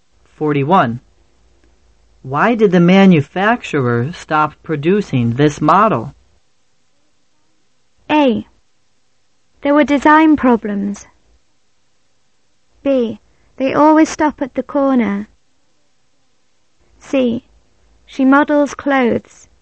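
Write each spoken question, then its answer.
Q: Why did the manufacturer stop producing this model?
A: A: There were design problems.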